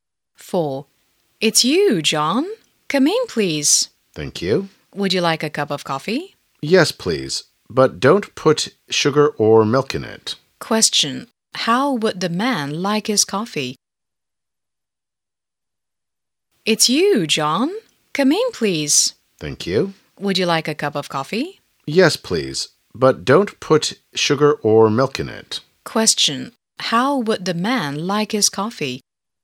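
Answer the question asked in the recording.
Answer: Black, without sugar or milk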